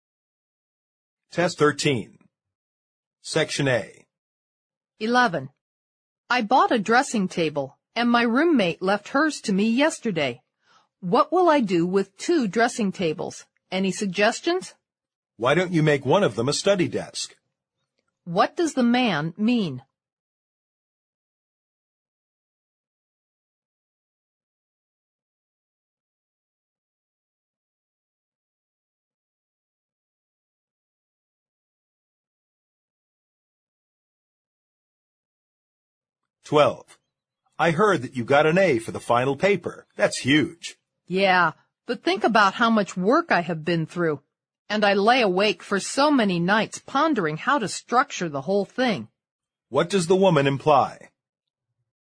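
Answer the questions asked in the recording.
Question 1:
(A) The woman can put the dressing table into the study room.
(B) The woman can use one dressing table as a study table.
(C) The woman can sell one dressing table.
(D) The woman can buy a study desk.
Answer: (B) The woman can use one dressing table as a study table.
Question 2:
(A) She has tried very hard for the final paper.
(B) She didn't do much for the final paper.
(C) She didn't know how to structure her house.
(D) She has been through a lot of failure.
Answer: (A) She has tried very hard for the final paper.

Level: 六级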